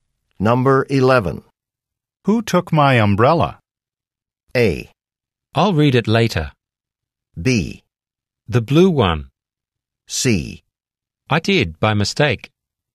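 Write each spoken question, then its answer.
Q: Who took my umbrella?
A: C: I did, by mistake.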